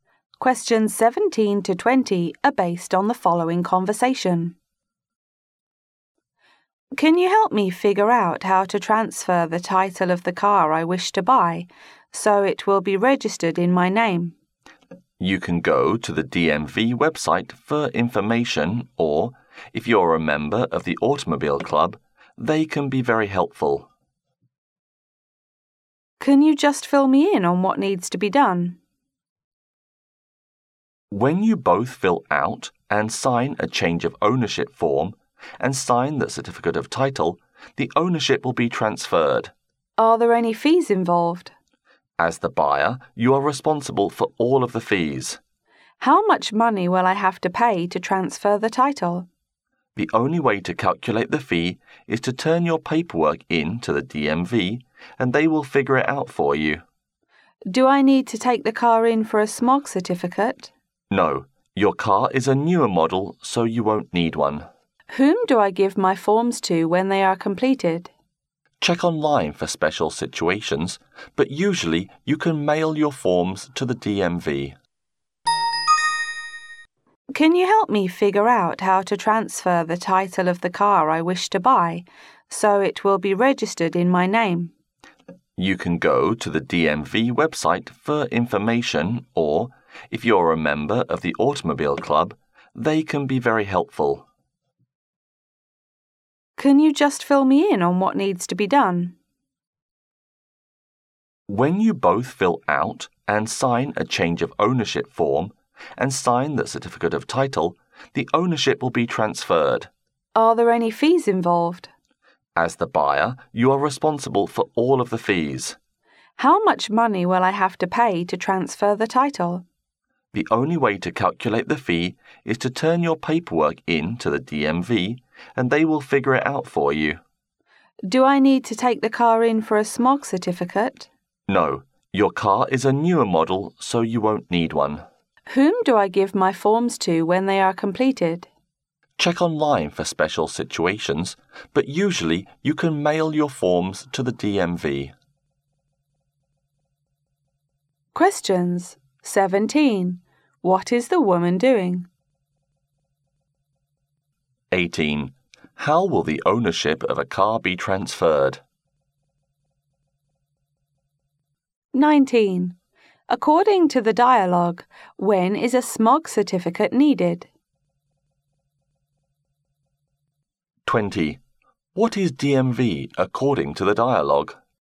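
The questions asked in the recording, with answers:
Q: How will the ownership of a car be transferred?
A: Both fill out and sign a change of ownership form and sign the certificate of title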